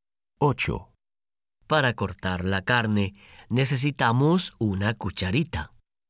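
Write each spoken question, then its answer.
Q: Para cortar la carne, necesitamos una cucharita.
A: No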